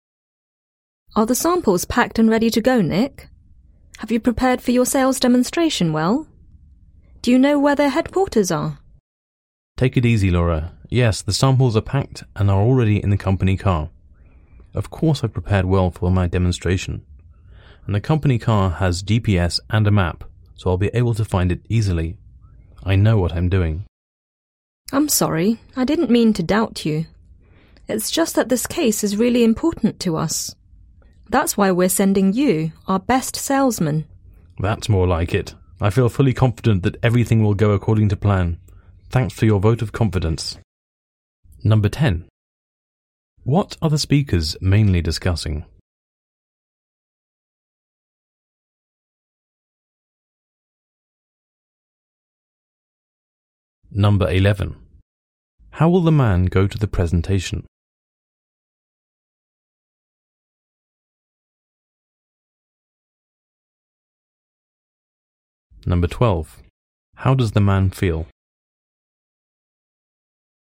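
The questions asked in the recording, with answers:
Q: What are the speakers mainly discussing?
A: Preparations for the man's sales demonstration

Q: How will the man go to the presentation?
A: By company car

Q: How does the man feel?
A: Confident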